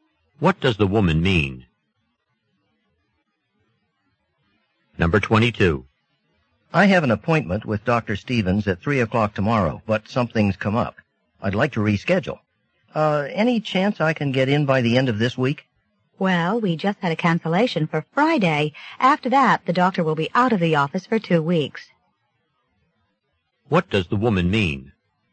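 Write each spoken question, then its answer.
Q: What does the woman mean?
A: The man can have an appointment on Friday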